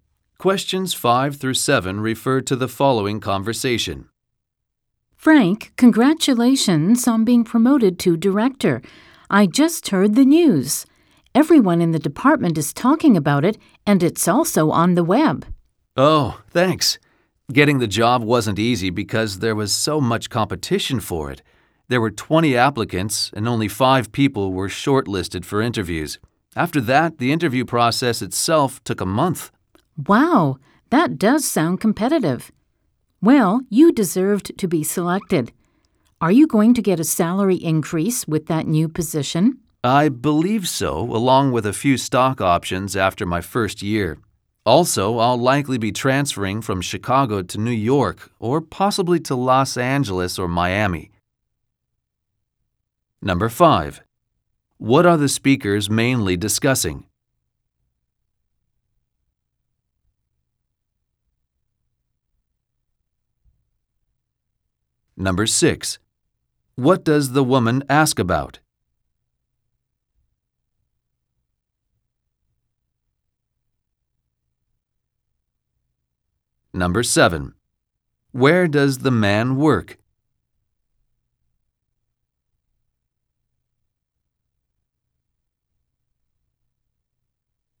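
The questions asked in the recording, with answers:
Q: What are the speakers mainly discussing?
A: The man's promotion to director

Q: What does the woman ask about?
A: Whether he will get a salary increase

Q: Where does the man work?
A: In Chicago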